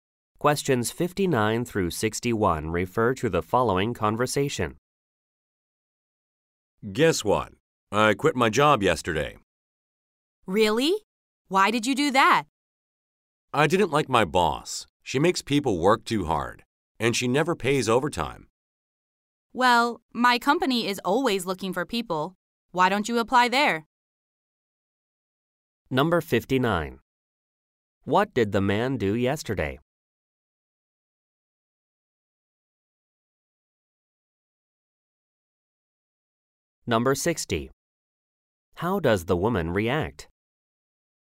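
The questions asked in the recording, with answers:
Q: What did the man do yesterday?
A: He quit his job

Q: How does the woman react?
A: She is surprised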